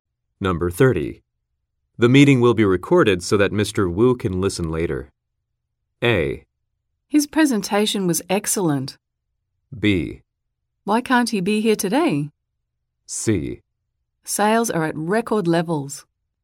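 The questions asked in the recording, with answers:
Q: The meeting will be recorded so that Mr. Wu can listen later.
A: B: Why can't he be here today?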